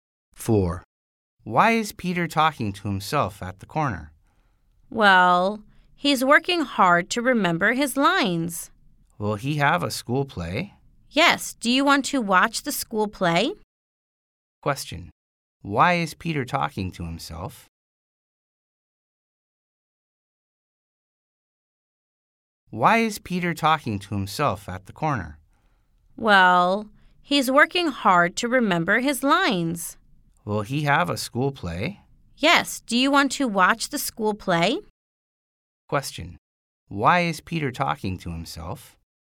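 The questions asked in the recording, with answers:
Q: Why is Peter talking to himself?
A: He's trying to remember his lines for the school play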